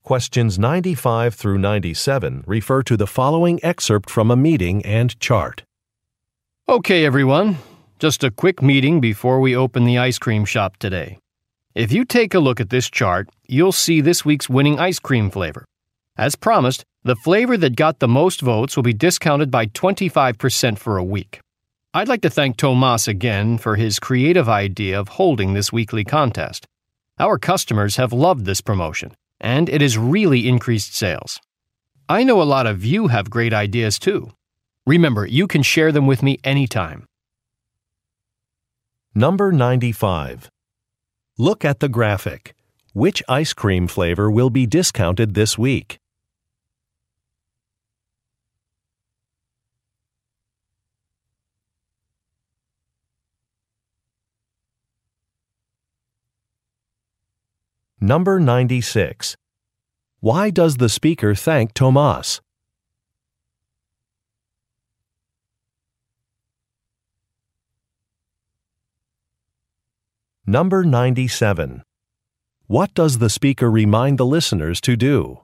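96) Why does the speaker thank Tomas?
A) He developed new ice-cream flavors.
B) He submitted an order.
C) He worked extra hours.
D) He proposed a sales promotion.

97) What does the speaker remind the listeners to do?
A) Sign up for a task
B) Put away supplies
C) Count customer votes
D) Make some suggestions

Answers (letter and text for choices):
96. D) He proposed a sales promotion.
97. D) Make some suggestions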